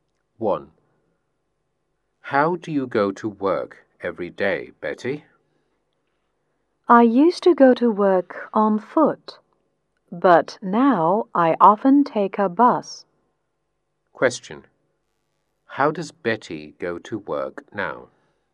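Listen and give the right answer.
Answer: She often takes a bus.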